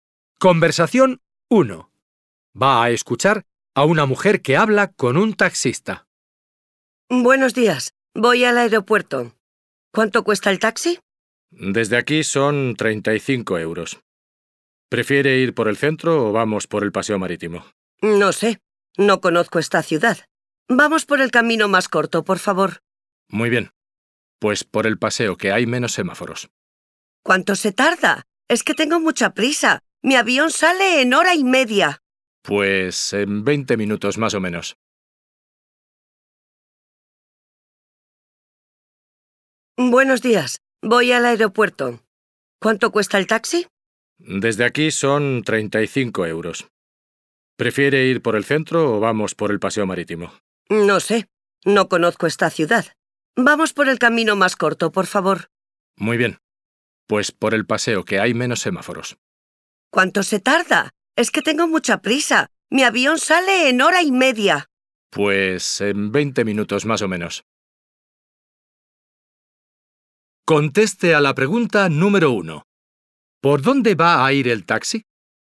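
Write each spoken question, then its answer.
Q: ¿Por dónde va a ir el taxi?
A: Por el paseo marítimo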